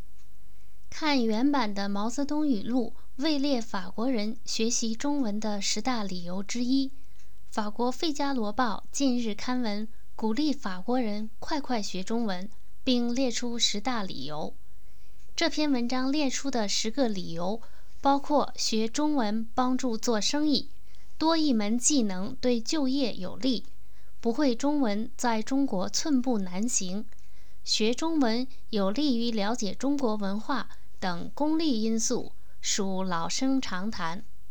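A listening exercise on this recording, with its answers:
Please answer the following questions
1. 文章中提出的学习中文的功利因素有哪些?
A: 学中文帮助做生意,多一门技能对就业有利,不会中文在中国寸步难行,学中文有利于了解中国文化

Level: 3rd Year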